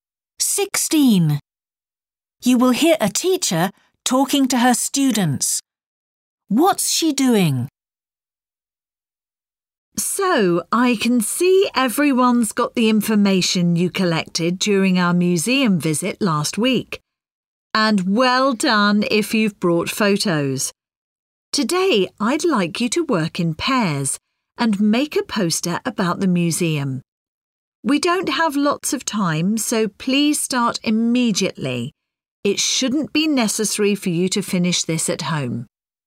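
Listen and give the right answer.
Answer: Giving instructions for a poster project about the museum visit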